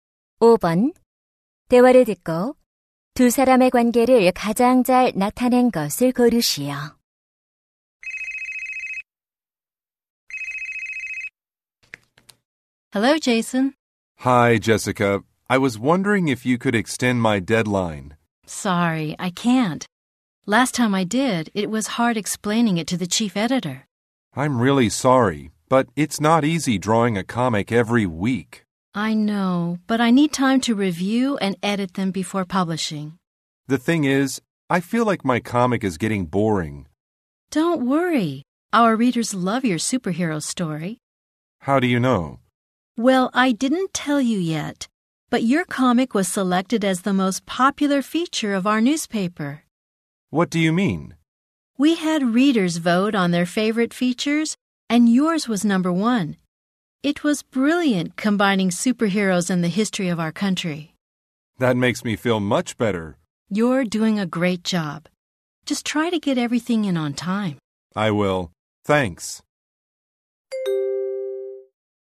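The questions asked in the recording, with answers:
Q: 대화를 듣고 두 사람의 관계를 가장 잘 나타낸 것을 고르시오.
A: 만화가 - 신문 편집자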